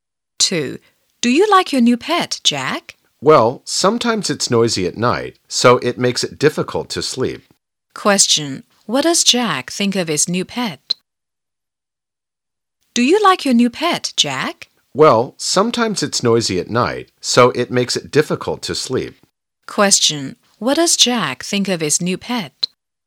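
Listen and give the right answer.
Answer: It's sometimes noisy at night, making it hard to sleep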